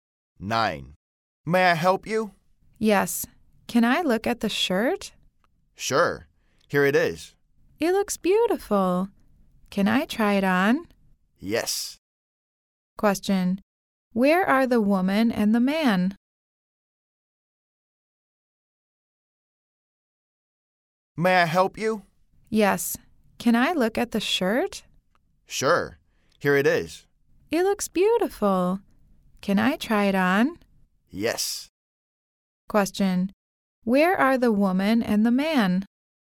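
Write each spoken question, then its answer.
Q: Where are the woman and the man?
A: In a clothing store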